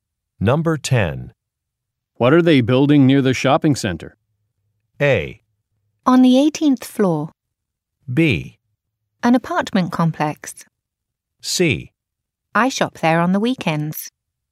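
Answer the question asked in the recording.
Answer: B: An apartment complex.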